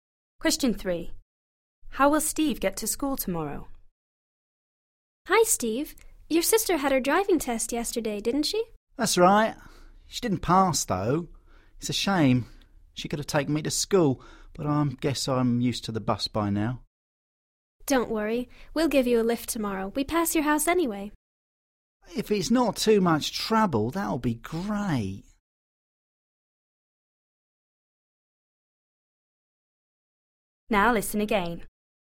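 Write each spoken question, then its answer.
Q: How will Steve get to school tomorrow?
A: By car (they'll give him a lift)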